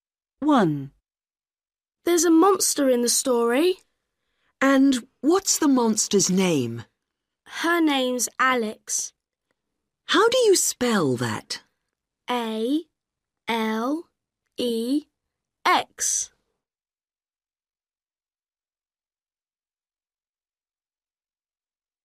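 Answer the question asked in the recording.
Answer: Alex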